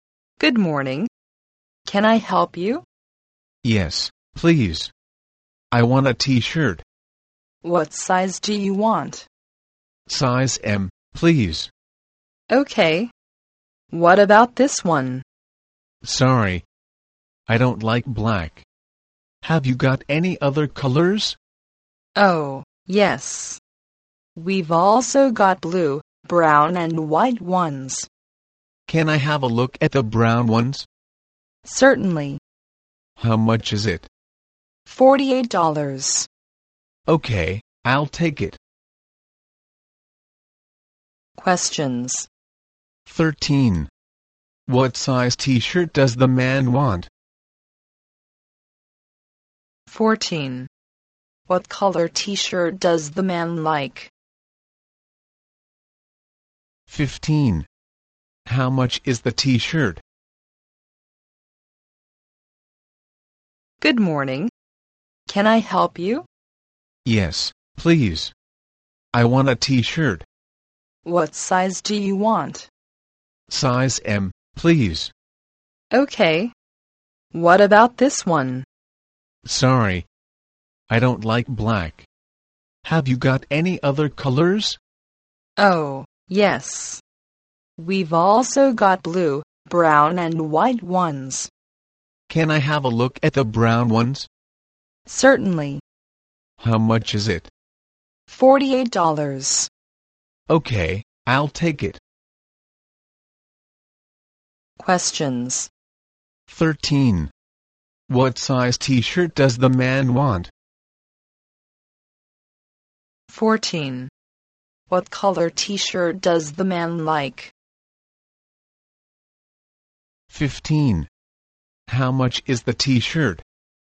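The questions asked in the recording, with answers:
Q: What size t-shirt does the man want?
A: Size M

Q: What color t-shirt does the man like?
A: Brown

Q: How much is the t-shirt?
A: $48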